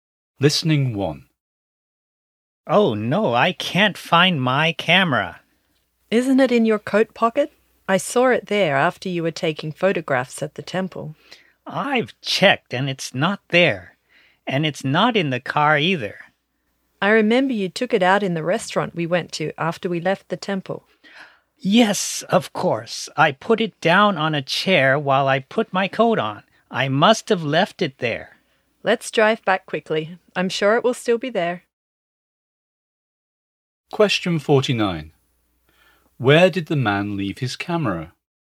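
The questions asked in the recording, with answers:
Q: Where did the man leave his camera?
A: On a chair in the restaurant they went to after the temple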